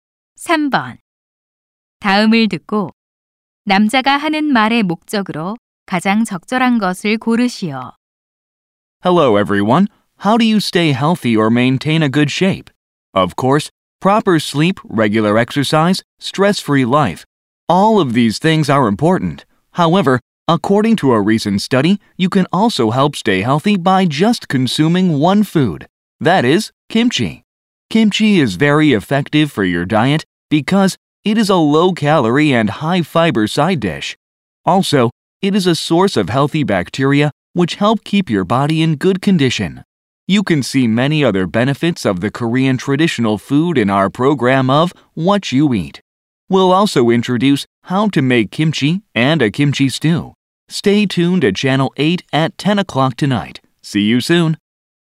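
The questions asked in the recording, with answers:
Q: 다음을 듣고 남자가 하는 말의 목적으로 가장 적절한 것을 고르시오.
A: 김치에 관한 TV 프로그램을 홍보하려고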